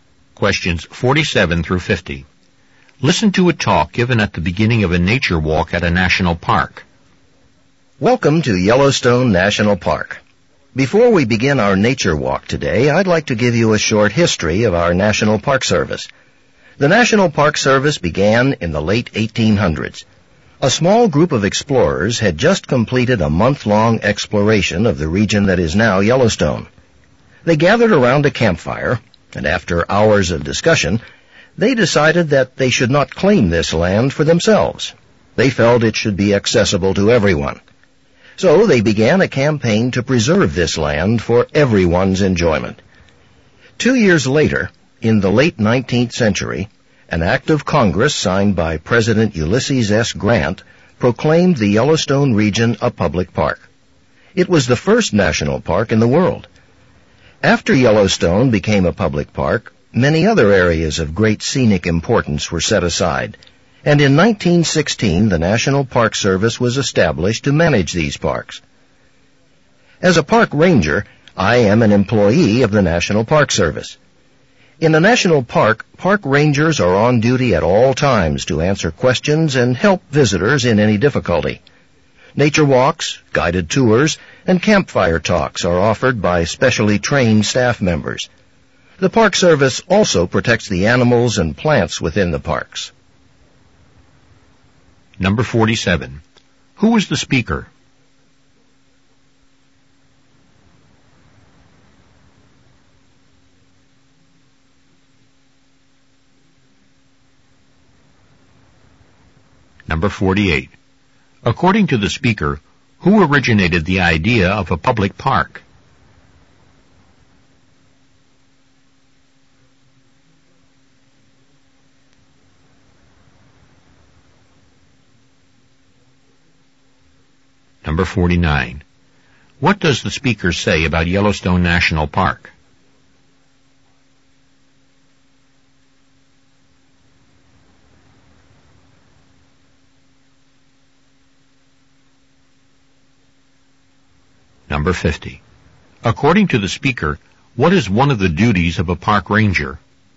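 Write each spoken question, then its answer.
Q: Who was the speaker?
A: A park ranger

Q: According to the speaker, who originated the idea of a public park?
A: A small group of explorers

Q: What does the speaker say about Yellowstone National Park?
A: It was the first national park in the world

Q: According to the speaker, what is one of the duties of a park ranger?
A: To answer visitors' questions and help them in any difficulty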